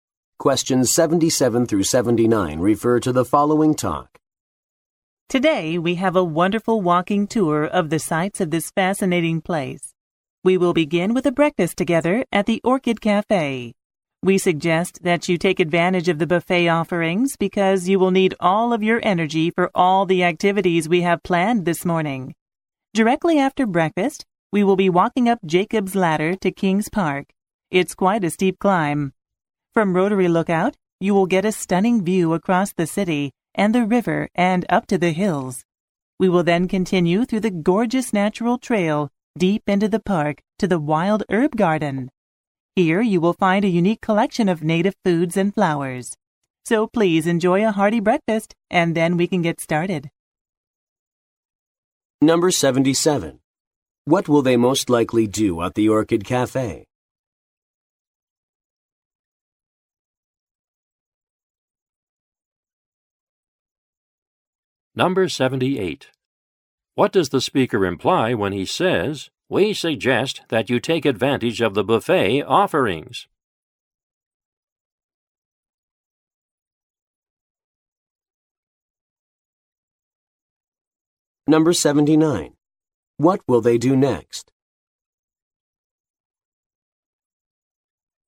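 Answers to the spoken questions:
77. Have breakfast
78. The tour will need a lot of energy
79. Walk up Jacob's Ladder to King's Park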